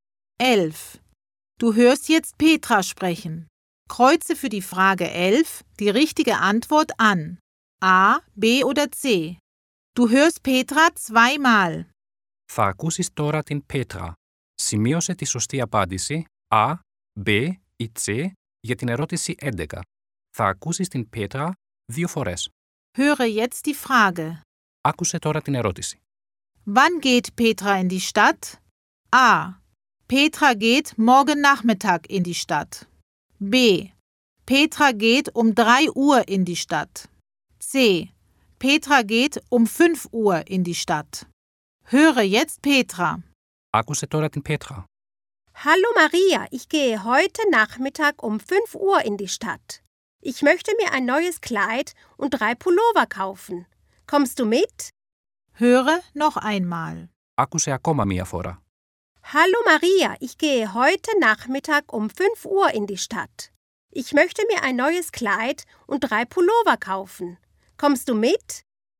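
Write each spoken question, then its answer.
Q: Wann geht Petra in die Stadt?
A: C: Petra geht um 5 Uhr in die Stadt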